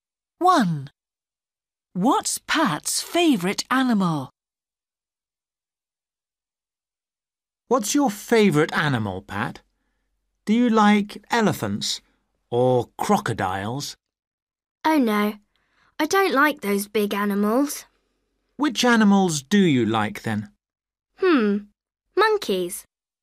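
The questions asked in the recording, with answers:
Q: What's Pat's favourite animal?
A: Monkeys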